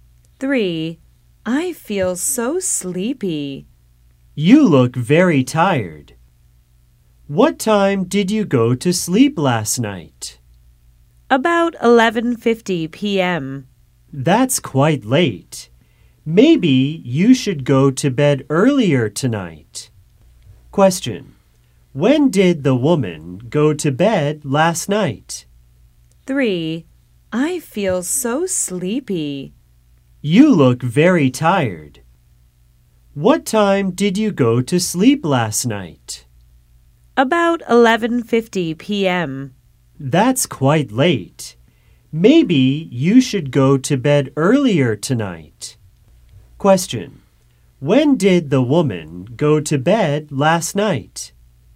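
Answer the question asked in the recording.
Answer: About 11:50 p.m.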